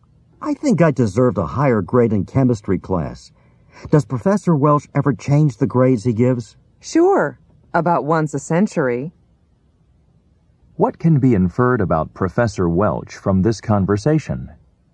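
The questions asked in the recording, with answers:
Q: What can be inferred about Professor Welch from this conversation?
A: He almost never changes grades.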